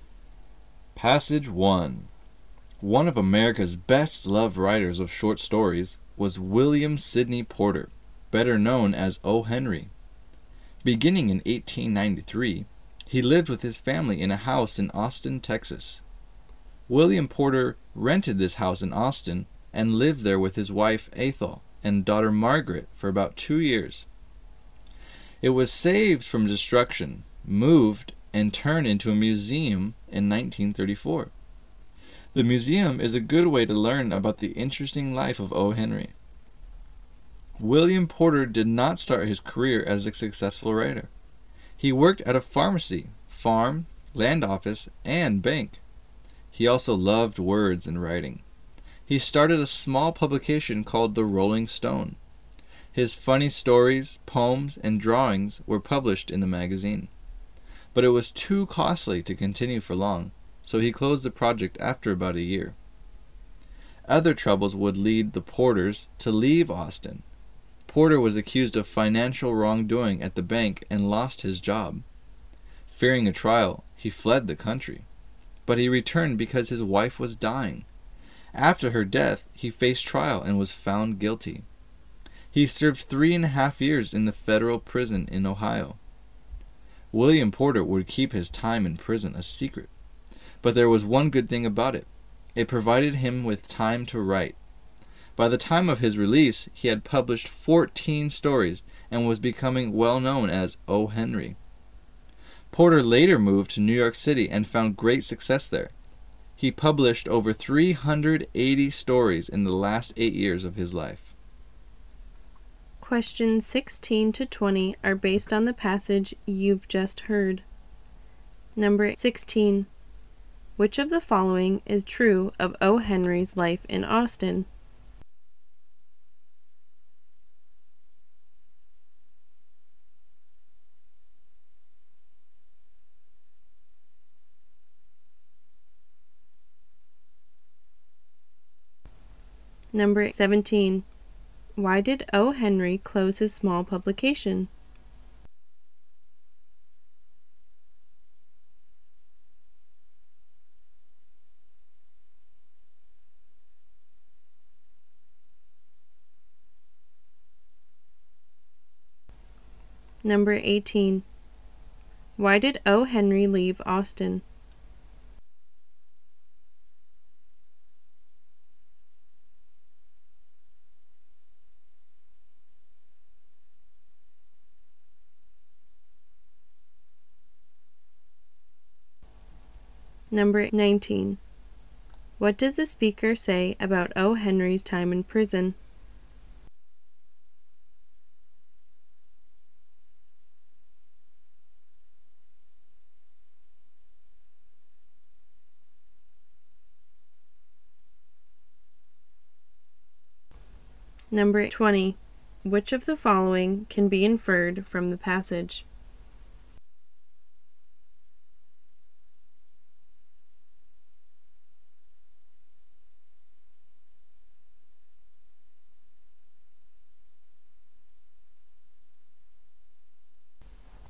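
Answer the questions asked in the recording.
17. It was too costly to continue
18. He was accused of financial wrongdoing at the bank and lost his job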